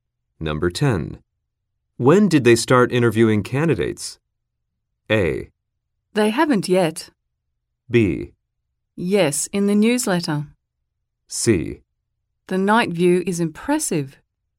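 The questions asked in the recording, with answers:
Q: When did they start interviewing candidates?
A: A: They haven't yet.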